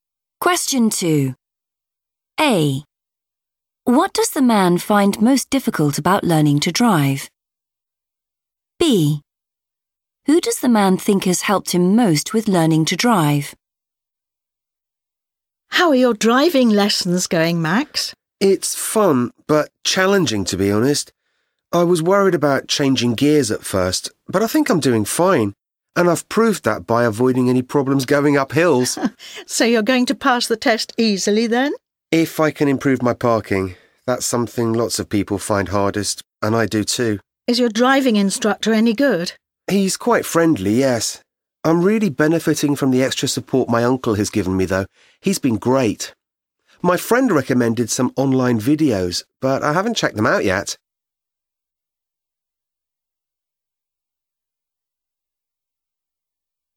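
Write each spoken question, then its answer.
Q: What does the man find most difficult about learning to drive?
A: parking

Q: Who does the man think has helped him most with learning to drive?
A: his uncle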